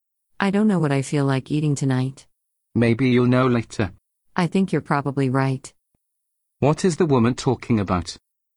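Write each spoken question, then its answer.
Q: What is the woman talking about?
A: What to eat tonight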